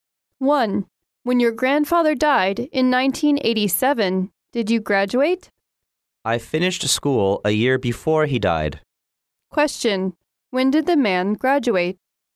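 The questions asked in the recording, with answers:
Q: When did the man graduate?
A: In 1986, a year before his grandfather died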